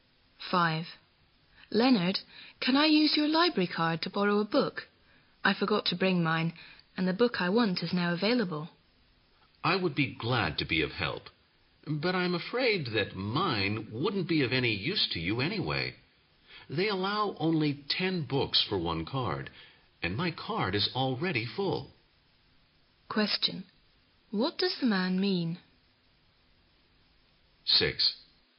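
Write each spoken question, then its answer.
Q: What does the man mean?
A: He can't help because his library card is already full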